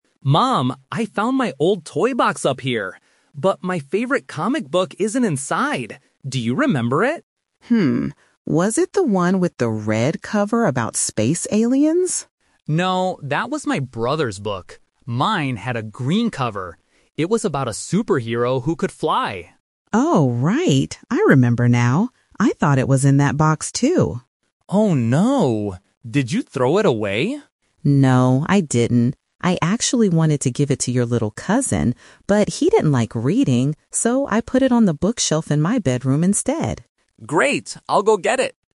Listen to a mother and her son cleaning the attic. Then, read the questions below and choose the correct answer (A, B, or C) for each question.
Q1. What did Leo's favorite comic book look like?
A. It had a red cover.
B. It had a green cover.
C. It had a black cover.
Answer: B. It had a green cover.

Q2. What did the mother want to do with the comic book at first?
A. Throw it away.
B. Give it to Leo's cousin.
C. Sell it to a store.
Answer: B. Give it to Leo's cousin.

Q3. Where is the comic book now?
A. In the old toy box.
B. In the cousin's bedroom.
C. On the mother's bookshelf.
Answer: C. On the mother's bookshelf.

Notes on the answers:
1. Leo clearly describes his book: "Mine had a green cover." Option (A) is a trap; the mother asks if it was the red one, but Leo says that was his brother's book. Option (C) is a plausible color for a book, but it is never mentioned in the conversation.
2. The mother explains her original plan by saying, "I actually wanted to give it to your little cousin." Option (A) is a trap; Leo asks if she threw it away, but she immediately says "No, I didn't." Option (C) is a plausible thing to do with old books, but it is not mentioned.
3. The mother explains the twist (the final result) by saying, "So, I put it on the bookshelf in my bedroom instead." Option (A) is a trap; Leo is looking in the toy box, and the mother thought it was there, but it wasn't. Option (B) is a trap; she wanted to give it to the cousin, but she didn't because he disliked reading.

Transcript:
Leo: Mom, I found my old toy box up here! But my favorite comic book isn't inside. Do you remember it?
Mom: Hmm. Was it the one with the red cover about space aliens?
Leo: No, that was my brother's book. Mine had a green cover. It was about a superhero who could fly.
Mom: Oh, right! I remember now. I thought it was in that box, too.
Leo: Oh no. Did you throw it away?
Mom: No, I didn't. I actually wanted to give it to your little cousin. But, he didn't like reading. So, I put it on the bookshelf in my bedroom instead.
Leo: Great! I'll go get it.

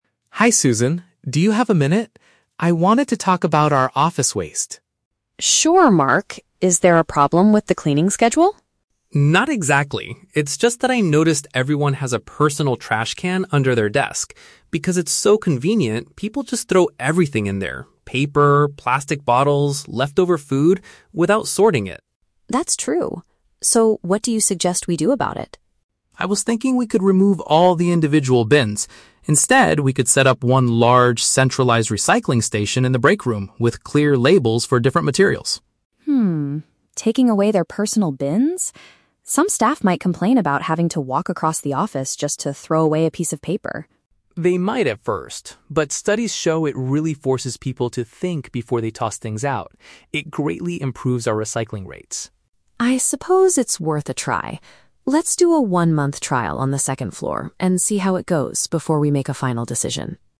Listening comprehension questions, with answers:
Listen to the conversation between an employee and a manager, then choose the correct answer (A, B, or C) for each question.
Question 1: What is Mark's main observation about the current situation?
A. The cleaners are not emptying the bins regularly.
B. Employees are not separating their garbage properly.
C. There are not enough trash cans in the breakroom.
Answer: B. Employees are not separating their garbage properly.

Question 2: What change does Mark want to introduce to the office?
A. He wants to provide a separate recycling bin for every desk.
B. He wants to hire an outside company to sort the materials.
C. He wants to create a single shared area for waste disposal.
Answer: C. He wants to create a single shared area for waste disposal.

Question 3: Why is Susan hesitant about the idea at first?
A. She worries that workers will be annoyed by the inconvenience.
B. She thinks it will cost too much money to buy new bins.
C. She believes the trial period of one month is too long.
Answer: A. She worries that workers will be annoyed by the inconvenience.

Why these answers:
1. Mark says that people throw everything in their bins "without sorting it." Option (B) uses the paraphrase "not separating their garbage properly." Option (A) is a trap; Susan asks if there is a problem with the "cleaning schedule," but Mark says "Not exactly" (rejecting the idea). Option (C) is not mentioned as a problem.
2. Mark suggests setting up "one large, centralized recycling station." Option (C) paraphrases this as a "single shared area." Option (A) is a trap; he mentions the word "desk," but his plan is to remove the bins from the desks, not add more. Option (B) is a plausible office solution but is never mentioned in the audio.
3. Susan points out that "staff might complain about having to walk across the office" to throw things away. Option (A) paraphrases this feeling as being "annoyed by the inconvenience." Option (C) is a trap; she herself suggests the "one-month trial" at the end of the conversation, so it is not the cause of her hesitation. Option (B) is a plausible concern for a manager but is not mentioned here.

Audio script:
Mark: Hi Susan, do you have a minute? I wanted to talk about our office waste.
Susan: Sure, Mark. Is there a problem with the cleaning schedule?
Mark: Not exactly. It's just that I noticed everyone has a personal trash can under their desk. Because it's so convenient, people just throw everything in there—paper, plastic bottles, leftover food—without sorting it.
Susan: That's true. So, what do you suggest we do about it?
Mark: I was thinking we could remove all the individual bins. Instead, we could set up one large, centralized recycling station in the breakroom with clear labels for different materials.
taking away their personal bins? Some staff might complain about having to walk across the office just to throw away a piece of paper.
Mark: They might at first. But studies show it really forces people to think before they toss things out. It greatly improves our recycling rates.
Susan: I suppose it's worth a try. Let's do a one-month trial on the second floor and see how it goes before we make a final decision.

